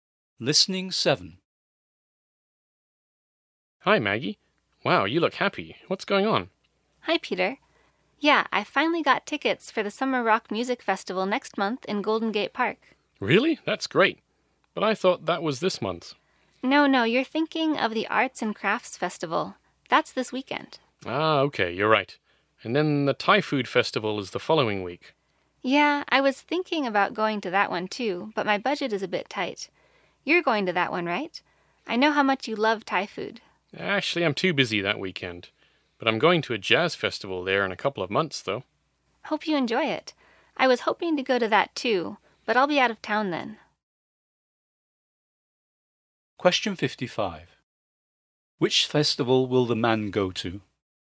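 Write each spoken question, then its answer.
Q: Which festival will the man go to?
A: The jazz festival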